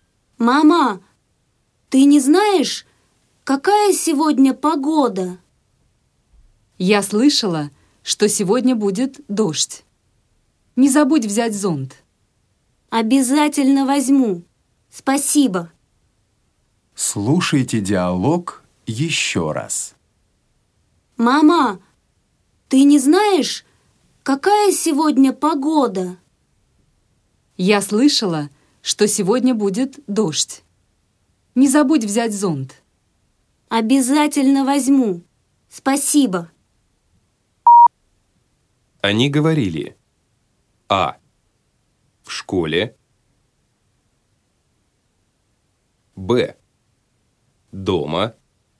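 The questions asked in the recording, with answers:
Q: Они говорили:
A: Б: Дома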